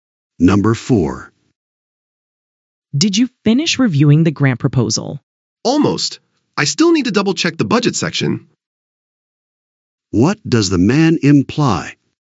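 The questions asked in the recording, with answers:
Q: What does the man imply?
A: He hasn't quite finished; he still has to check the budget.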